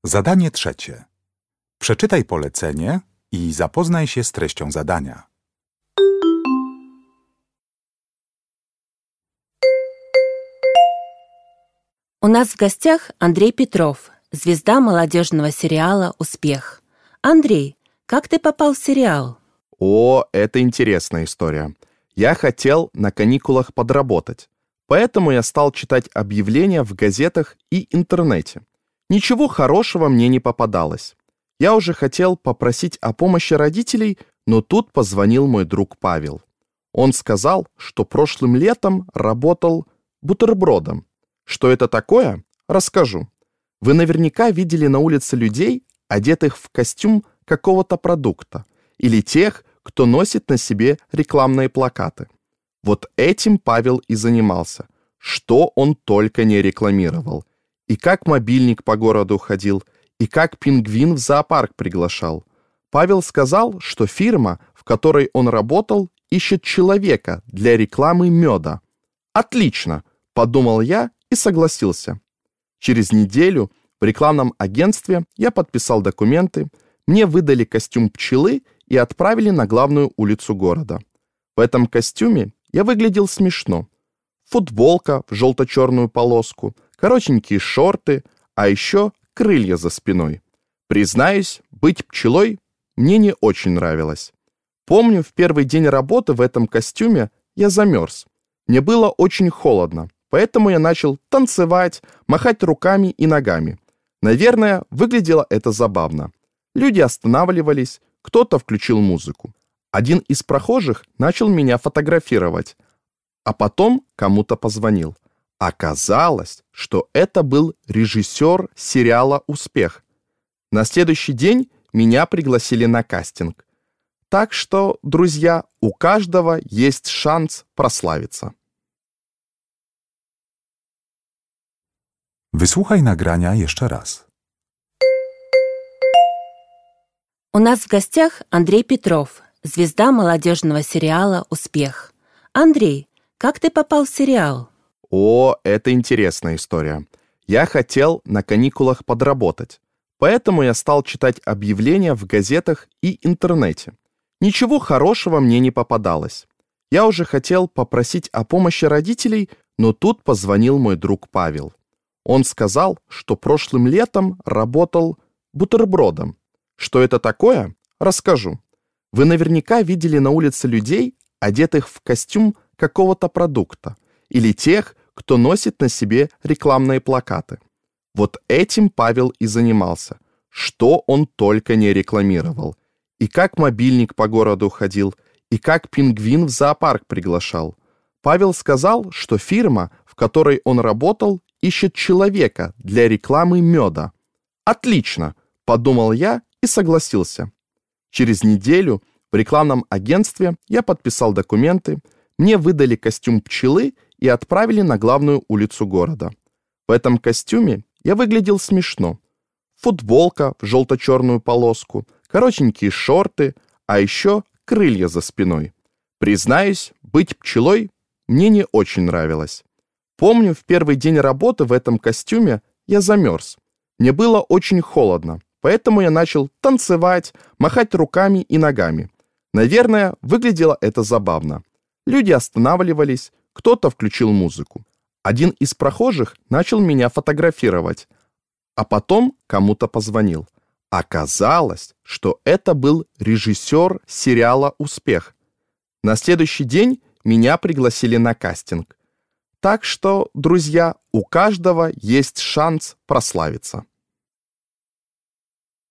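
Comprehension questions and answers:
Uruchamiając odtwarzacz z oryginalnym nagraniem CKE usłyszysz dwukrotnie wywiad z młodym aktorem. Na podstawie informacji zawartych w nagraniu odpowiedz krótko na pytania 3.1.–3.3., tak aby jak najbardziej precyzyjnie oddać sens wysłuchanego tekstu. Na pytania należy odpowiedzieć w języku rosyjskim.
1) Кто помог Андрею найти работу в рекламном агентстве?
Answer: Друг Павел

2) В каком костюме работал Андрей?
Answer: В костюме пчелы

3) Почему Андрей начал танцевать на улице?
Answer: Потому что ему было холодно (он замёрз)

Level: egzamin ósmoklasisty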